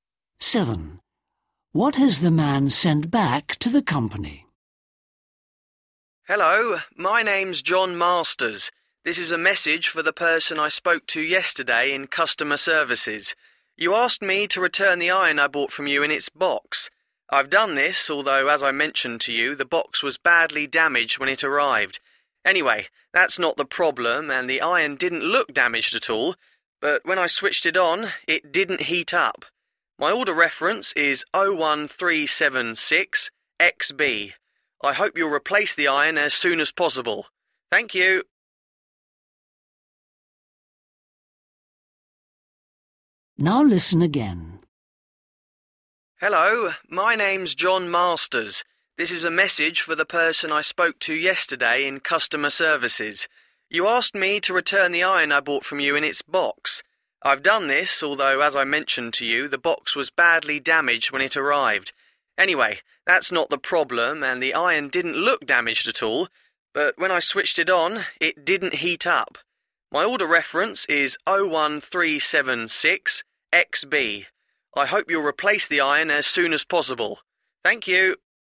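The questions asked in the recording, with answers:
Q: What has the man sent back to the company?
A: the iron in its box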